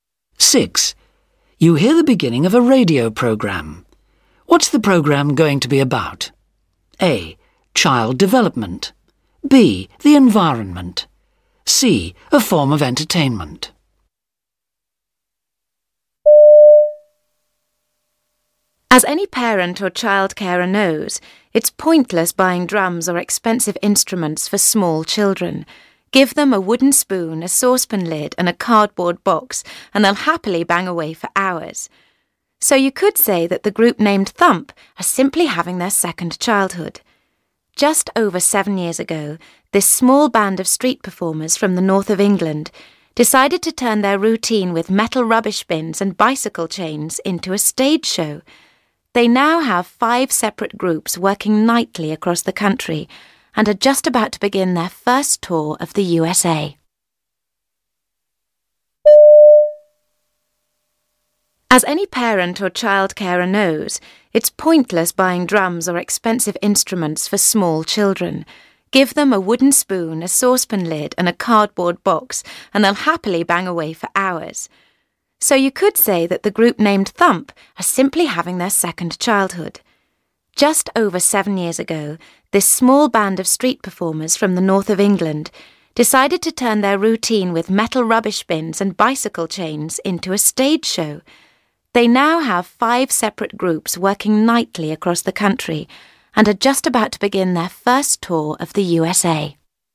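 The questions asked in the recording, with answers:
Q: What's the program going to be about?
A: C: A form of entertainment.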